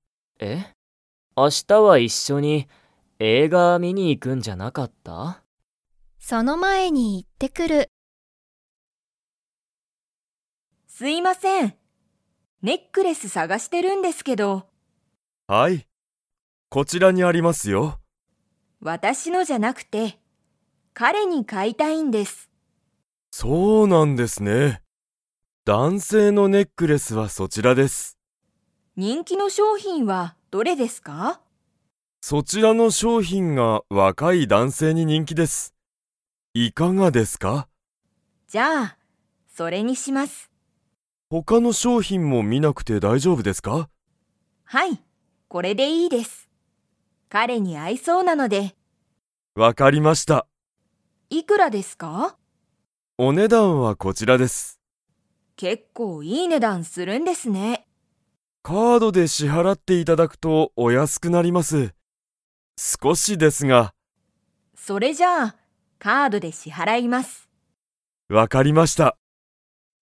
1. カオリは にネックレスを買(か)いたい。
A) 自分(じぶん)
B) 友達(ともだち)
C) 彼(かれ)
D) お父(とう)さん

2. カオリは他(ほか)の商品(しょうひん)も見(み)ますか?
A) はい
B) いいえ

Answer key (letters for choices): 1C, 2B

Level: Level 4